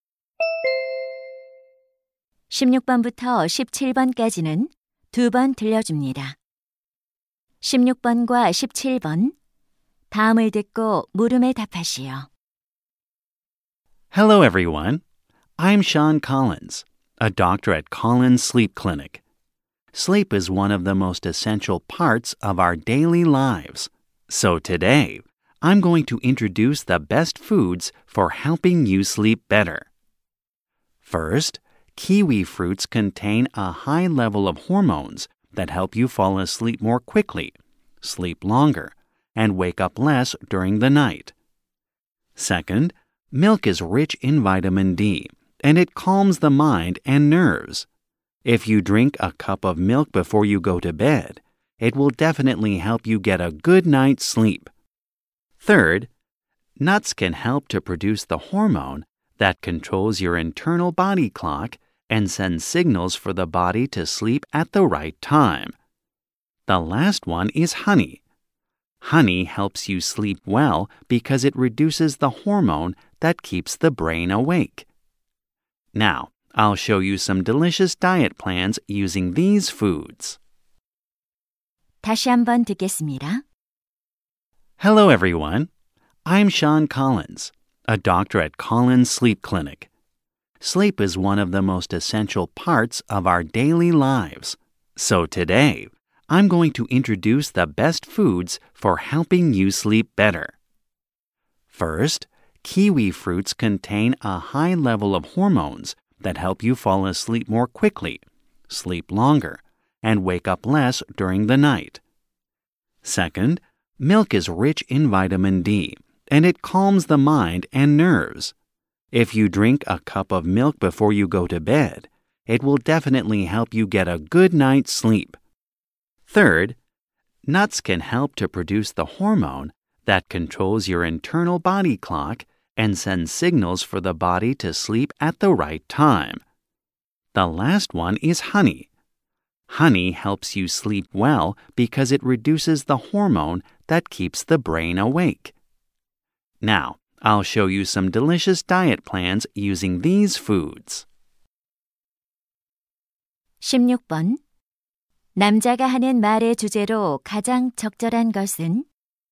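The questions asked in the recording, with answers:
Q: 남자가 하는 말의 주제로 가장 적절한 것은?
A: 숙면에 도움이 되는 음식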